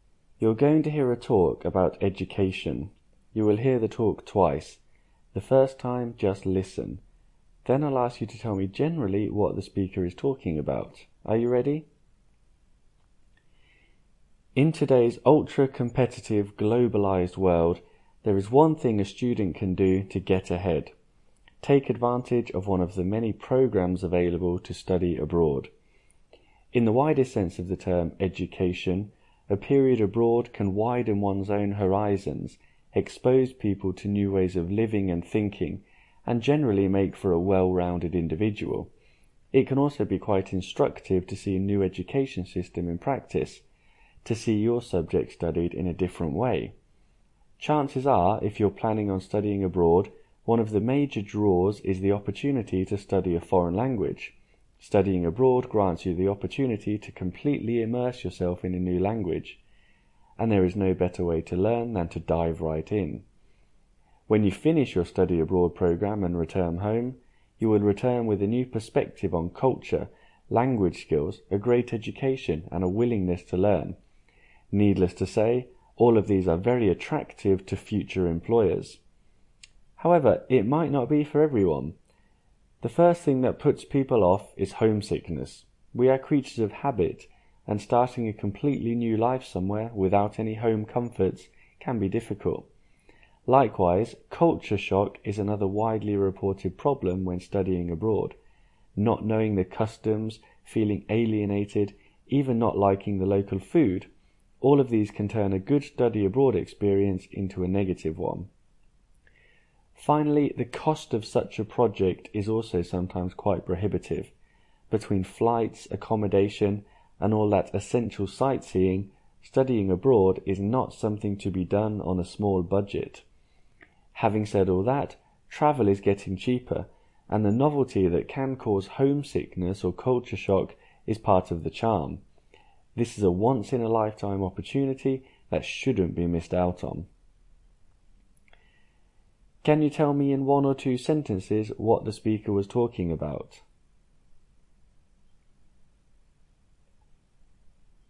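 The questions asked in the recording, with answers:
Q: Can you tell me in one or two sentences what the speaker was talking about?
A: The advantages and disadvantages of studying abroad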